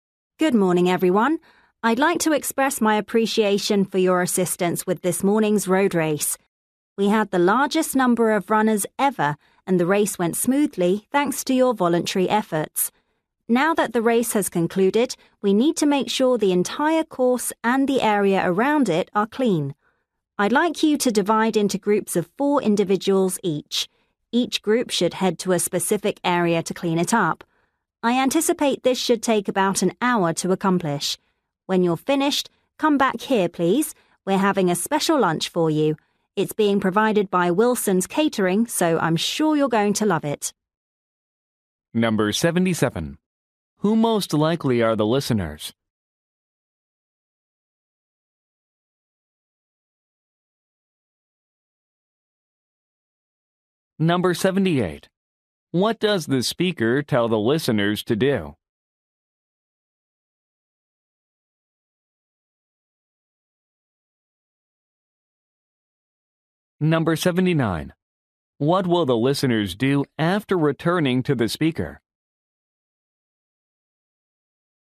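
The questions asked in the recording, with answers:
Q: Who most likely are the listeners?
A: Volunteers at a road race

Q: What does the speaker tell the listeners to do?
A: Divide into groups of four

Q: What will the listeners do after returning to the speaker?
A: Have a special lunch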